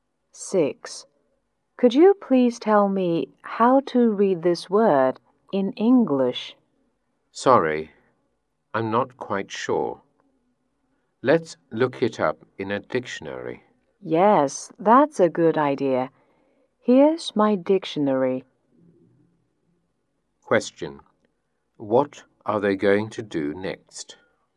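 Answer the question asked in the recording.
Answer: Look the word up in a dictionary.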